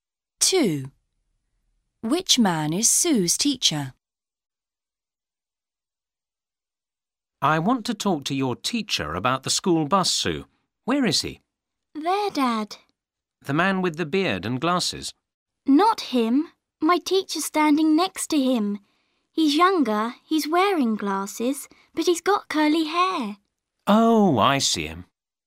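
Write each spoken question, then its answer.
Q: Which man is Sue's teacher?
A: the younger man with glasses and curly hair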